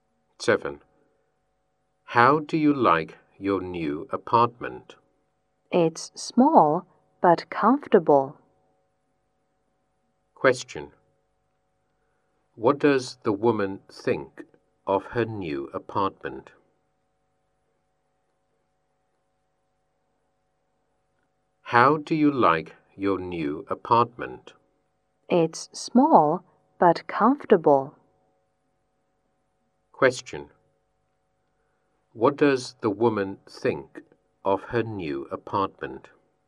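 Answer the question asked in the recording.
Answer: It's small but comfortable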